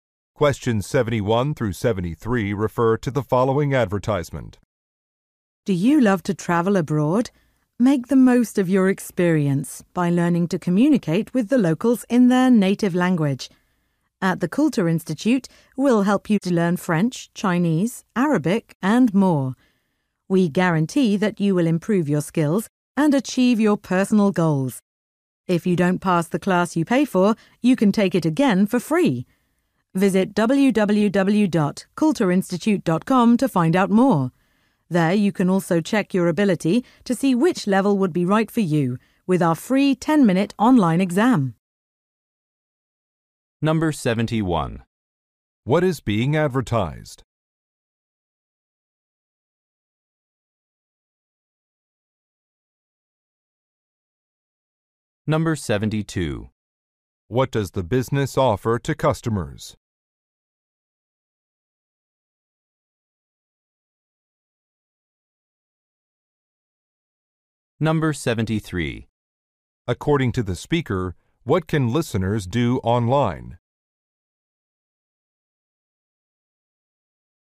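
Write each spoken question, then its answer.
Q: What is being advertised?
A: A language school (Kultur Institute)

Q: What does the business offer to customers?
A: A free retake of a class if they don't pass

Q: According to the speaker, what can listeners do online?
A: Take a free 10-minute test to check their level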